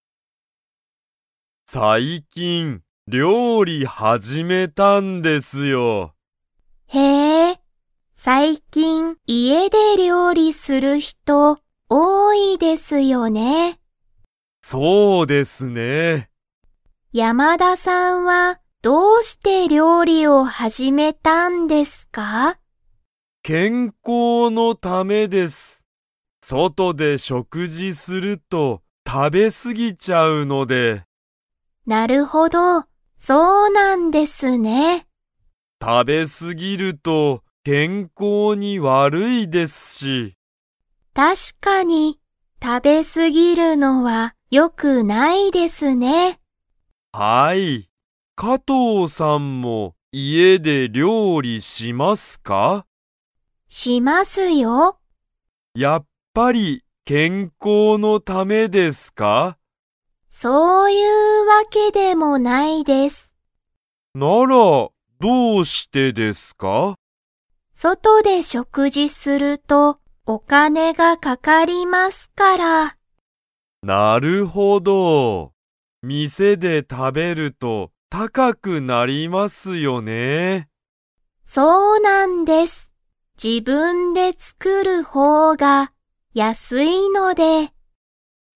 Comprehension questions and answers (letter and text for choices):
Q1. 山田やまださんは、 のために料理りょうりを始はじめた。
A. 彼女かのじょ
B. 友達ともだち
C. お金かね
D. 健康けんこう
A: D. 健康けんこう

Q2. 加藤かとうさんが料理りょうりを始はじめたのは、健康けんこうのためですか?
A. はい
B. いいえ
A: B. いいえ

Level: Level 3